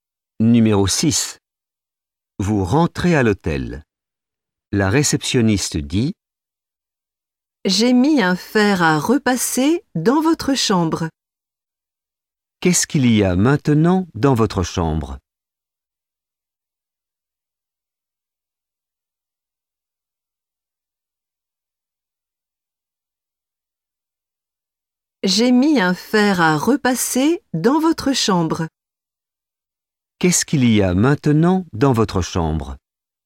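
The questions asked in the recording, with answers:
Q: Qu'est-ce qu'il y a maintenant dans votre chambre?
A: un fer à repasser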